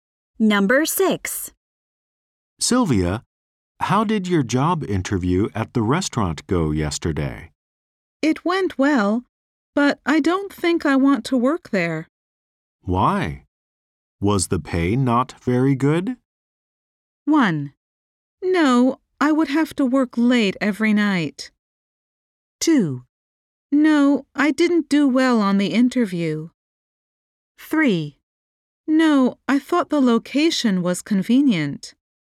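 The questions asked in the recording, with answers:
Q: Why? Was the pay not very good?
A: 1: No, I would have to work late every night.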